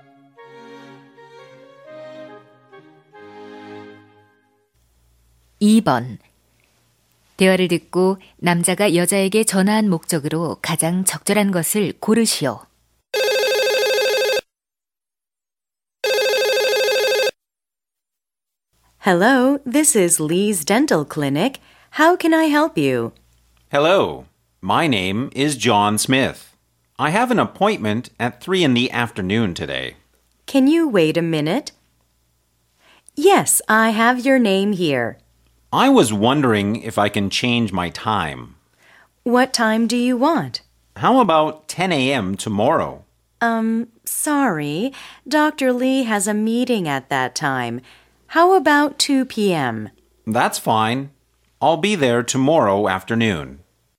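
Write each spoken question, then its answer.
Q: 대화를 듣고 남자가 여자에게 전화한 목적으로 가장 적절한 것을 고르시오.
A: 진료 예약 시간을 변경하려고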